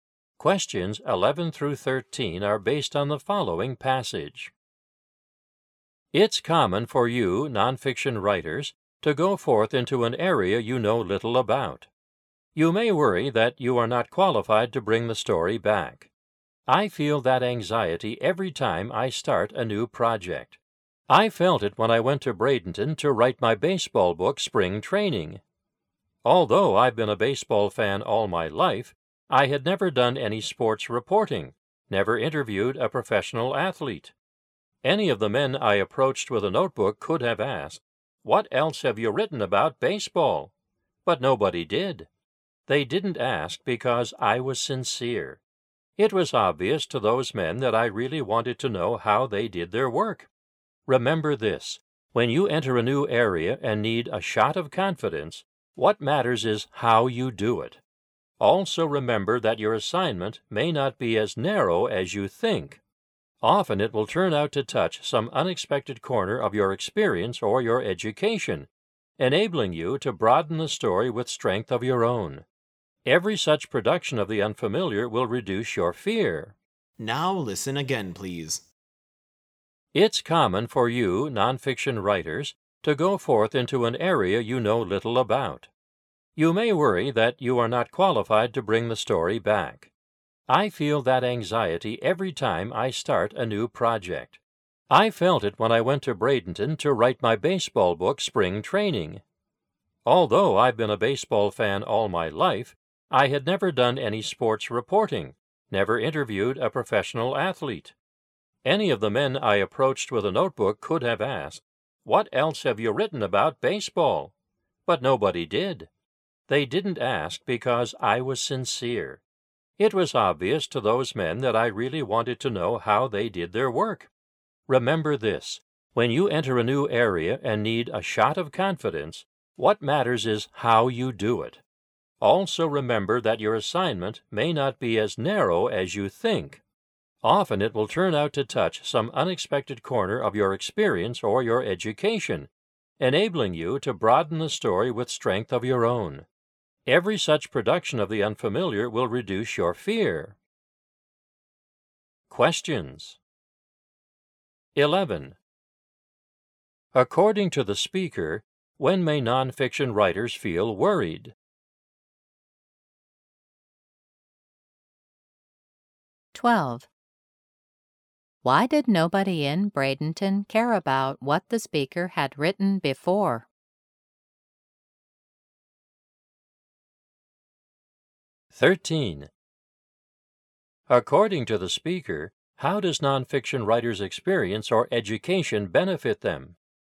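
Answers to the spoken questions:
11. When they go into an area they know little about
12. Because the speaker was sincere
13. It helps them broaden the story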